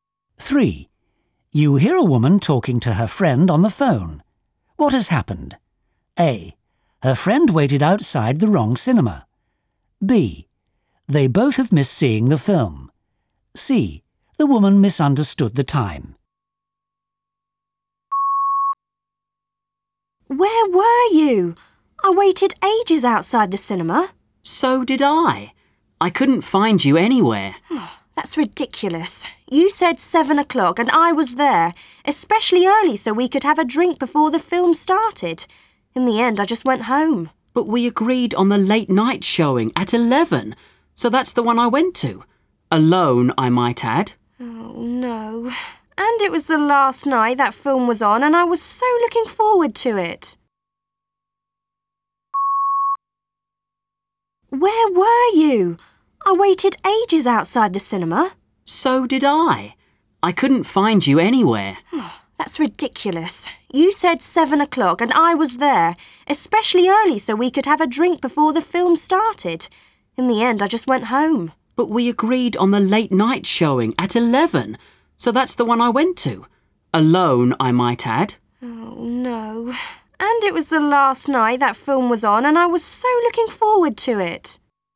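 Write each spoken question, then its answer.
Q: What has happened? A. Her friend waited outside the wrong cinema. B. They both have missed seeing the film. C. The woman misunderstood the time.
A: C: The woman misunderstood the time.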